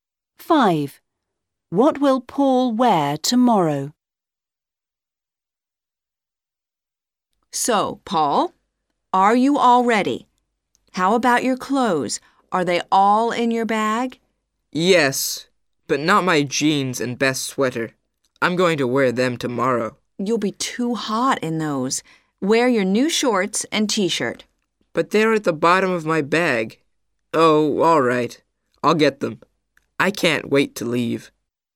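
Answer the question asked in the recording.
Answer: his new shorts and t-shirt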